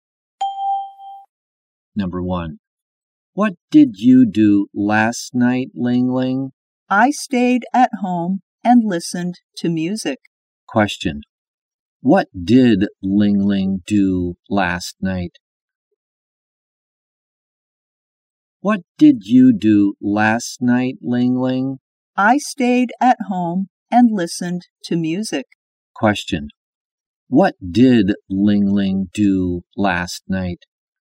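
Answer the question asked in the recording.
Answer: She stayed at home and listened to music.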